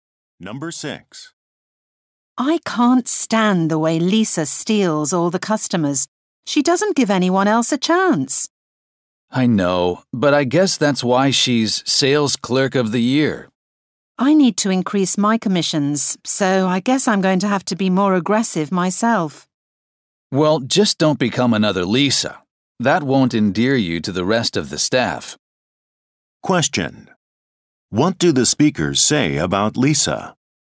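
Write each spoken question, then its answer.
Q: What do the speakers say about Lisa?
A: She is too aggressive and takes all the customers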